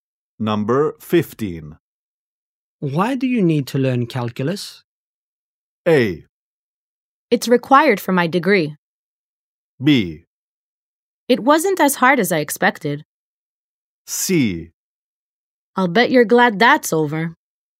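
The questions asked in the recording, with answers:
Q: Why do you need to learn calculus?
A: A: It's required for my degree.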